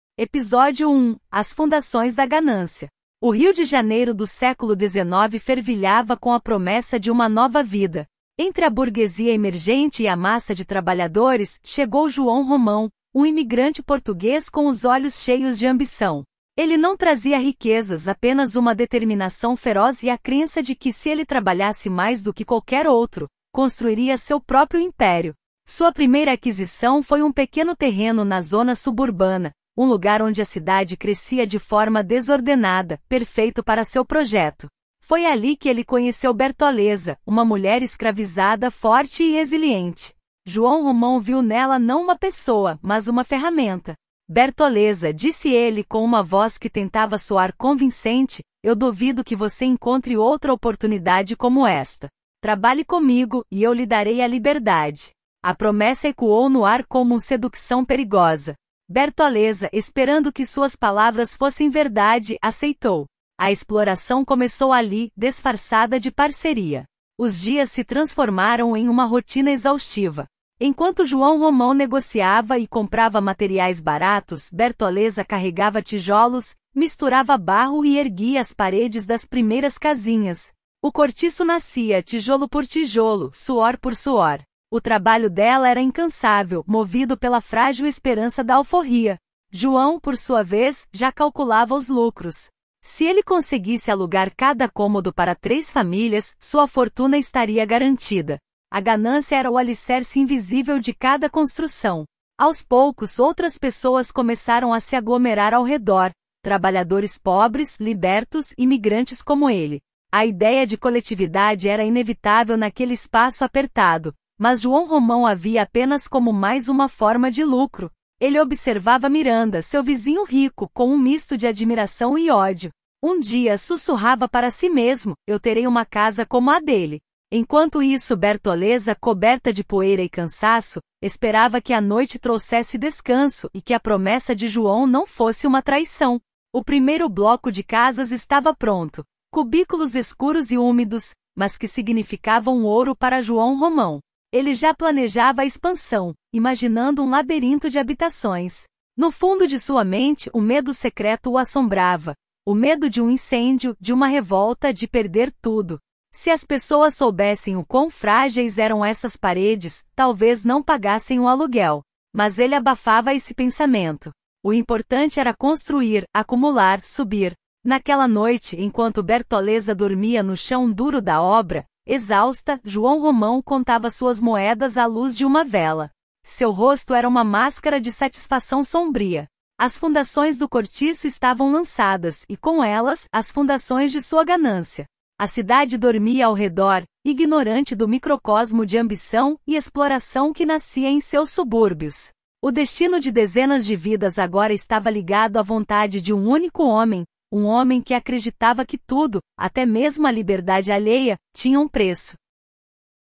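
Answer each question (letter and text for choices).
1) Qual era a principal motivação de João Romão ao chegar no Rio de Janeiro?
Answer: A ambição de construir seu próprio império e enriquecer.

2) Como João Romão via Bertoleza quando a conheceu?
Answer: Não como uma pessoa, mas como uma ferramenta.

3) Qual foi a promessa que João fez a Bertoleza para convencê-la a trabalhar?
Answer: Que lhe daria a liberdade.

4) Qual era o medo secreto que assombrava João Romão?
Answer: O medo de um incêndio, de uma revolta, de perder tudo.

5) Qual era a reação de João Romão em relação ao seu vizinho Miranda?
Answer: Um misto de admiração e ódio.

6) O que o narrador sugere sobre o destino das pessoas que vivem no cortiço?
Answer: Que estava ligado à vontade de um único homem, João Romão.

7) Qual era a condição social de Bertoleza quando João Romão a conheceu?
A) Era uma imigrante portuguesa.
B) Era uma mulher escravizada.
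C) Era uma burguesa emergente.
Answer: B) Era uma mulher escravizada.

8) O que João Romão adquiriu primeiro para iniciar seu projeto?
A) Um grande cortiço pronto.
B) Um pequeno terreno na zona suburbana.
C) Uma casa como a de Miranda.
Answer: B) Um pequeno terreno na zona suburbana.

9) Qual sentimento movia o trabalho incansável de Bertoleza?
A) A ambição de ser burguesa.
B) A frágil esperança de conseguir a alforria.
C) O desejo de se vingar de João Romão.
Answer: B) A frágil esperança de conseguir a alforria.

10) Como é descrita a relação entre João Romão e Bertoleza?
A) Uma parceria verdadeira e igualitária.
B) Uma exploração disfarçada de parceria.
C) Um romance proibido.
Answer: B) Uma exploração disfarçada de parceria.

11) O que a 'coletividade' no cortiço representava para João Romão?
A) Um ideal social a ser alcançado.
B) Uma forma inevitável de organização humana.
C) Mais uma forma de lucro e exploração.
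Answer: C) Mais uma forma de lucro e exploração.

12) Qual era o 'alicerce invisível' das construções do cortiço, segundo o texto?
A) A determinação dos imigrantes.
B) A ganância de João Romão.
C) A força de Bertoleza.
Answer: B) A ganância de João Romão.

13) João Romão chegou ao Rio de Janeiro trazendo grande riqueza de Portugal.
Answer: Falso

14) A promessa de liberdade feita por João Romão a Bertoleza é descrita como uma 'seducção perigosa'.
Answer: Verdadeiro

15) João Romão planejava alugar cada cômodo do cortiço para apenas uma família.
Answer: Falso

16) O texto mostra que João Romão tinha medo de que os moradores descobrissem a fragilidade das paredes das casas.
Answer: Verdadeiro

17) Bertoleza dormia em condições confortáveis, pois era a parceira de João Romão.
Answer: Falso

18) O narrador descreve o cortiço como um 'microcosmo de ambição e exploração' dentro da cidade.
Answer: Verdadeiro

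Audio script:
Episódio 1: As Fundações da Ganância – TEST
O Rio de Janeiro do século XIX fervilhava com a promessa de uma nova vida. Entre a burguesia emergente e a massa de trabalhadores, chegou João Romão, um imigrante português com os olhos cheios de ambição. Ele não trazia riquezas, apenas uma determinação feroz e a crença de que, se ele trabalhasse mais do que qualquer outro, construiria seu próprio império. Sua primeira aquisição foi um pequeno terreno na zona suburbana, um lugar onde a cidade crescia de forma desordenada, perfeito para seu projeto.
Foi ali que ele conheceu Bertoleza, uma mulher escravizada, forte e resiliente. João Romão viu nela não uma pessoa, mas uma ferramenta. 'Bertoleza', disse ele, com uma voz que tentava soar convincente, 'eu duvido que você encontre outra oportunidade como esta. Trabalhe comigo, e eu lhe darei a liberdade.' A promessa ecoou no ar como um seducção perigosa. 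Bertoleza, esperando que suas palavras fossem verdade, aceitou. A exploração começou ali, disfarçada de parceria.
Os dias se transformaram em uma rotina exaustiva. Enquanto João Romão negociava e comprava materiais baratos, Bertoleza carregava tijolos, misturava barro e erguia as paredes das primeiras casinhas. O cortiço nascia, tijolo por tijolo, suor por suor. O trabalho dela era incansável, movido pela frágil esperança da alforria. João, por sua vez, já calculava os lucros. Se ele conseguisse alugar cada cômodo para três famílias, sua fortuna estaria garantida. A ganância era o alicerce invisível de cada construção.
Aos poucos, outras pessoas começaram a se aglomerar ao redor: trabalhadores pobres, libertos, imigrantes como ele. A ideia de coletividade era inevitável naquele espaço apertado, mas João Romão a via apenas como mais uma forma de lucro. Ele observava Miranda, seu vizinho rico, com um misto de admiração e ódio. 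'Um dia', sussurrava para si mesmo, 'eu terei uma casa como a dele.' Enquanto isso, Bertoleza, coberta de poeira e cansaço, esperava que a noite trouxesse descanso e que a promessa de João não fosse uma traição.
O primeiro bloco de casas estava pronto: cubículos escuros e úmidos, mas que significavam ouro para João Romão. Ele já planejava a expansão, imaginando um labirinto de habitações. No fundo de sua mente, um medo secreto o assombrava: o medo de um incêndio, de uma revolta, de perder tudo. Se as pessoas soubessem o quão frágeis eram essas paredes, talvez não pagassem o aluguel. Mas ele abafava esse pensamento. O importante era construir, acumular, subir.
Naquela noite, enquanto Bertoleza dormia no chão duro da obra, exausta, João Romão contava suas moedas à luz de uma vela. Seu rosto era uma máscara de satisfação sombria. As fundações do cortiço estavam lançadas, e com elas, as fundações de sua ganância. 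A cidade dormia ao redor, ignorante do microcosmo de ambição e exploração que nascia em seus subúrbios. O destino de dezenas de vidas agora estava ligado à vontade de um único homem, um homem que acreditava que tudo, até mesmo a liberdade alheia, tinha um preço.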